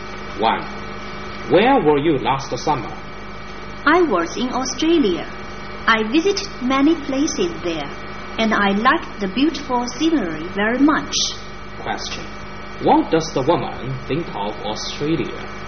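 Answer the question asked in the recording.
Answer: She liked its beautiful scenery very much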